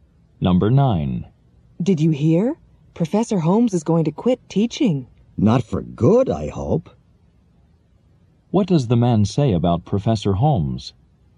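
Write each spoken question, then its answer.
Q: What does the man say about Professor Holmes?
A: He hopes Professor Holmes is not quitting for good.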